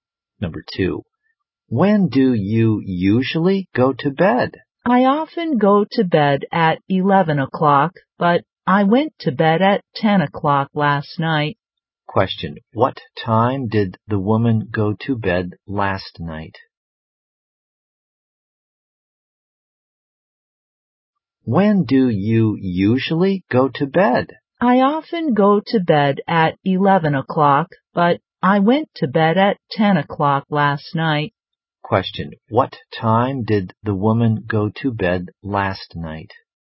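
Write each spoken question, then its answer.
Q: Question, what time did the woman go to bed last night?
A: At 10 o'clock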